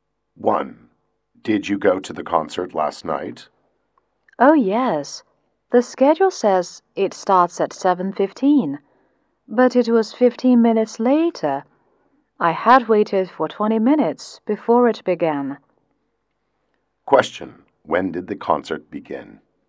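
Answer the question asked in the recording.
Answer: At 7:30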